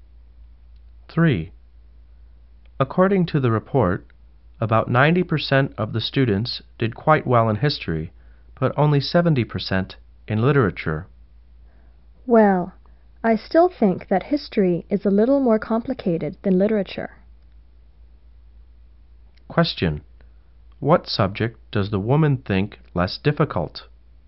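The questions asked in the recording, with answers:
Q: Question. What subject does the woman think less difficult?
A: Literature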